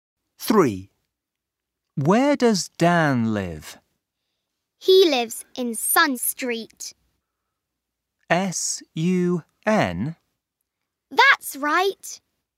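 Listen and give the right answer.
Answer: Sun Street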